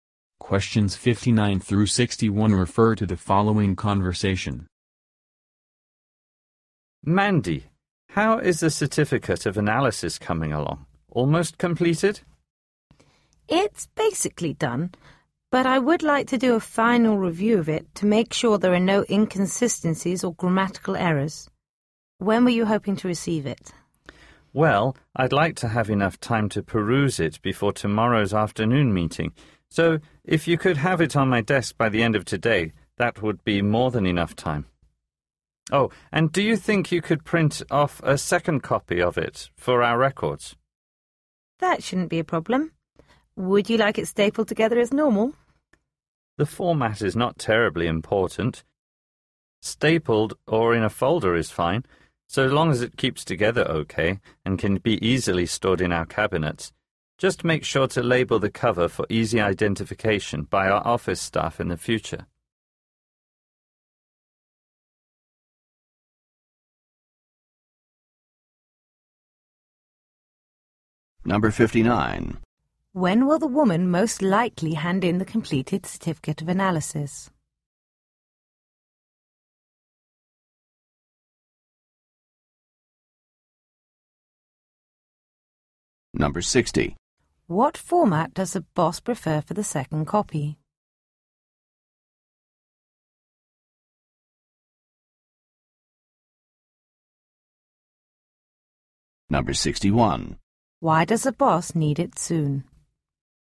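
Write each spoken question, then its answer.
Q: When will the woman most likely hand in the completed certificate of analysis?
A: By the end of today

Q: What format does the boss prefer for the second copy?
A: Either stapled or in a folder, with a labeled cover

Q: Why does the boss need it soon?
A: To read it before tomorrow afternoon's meeting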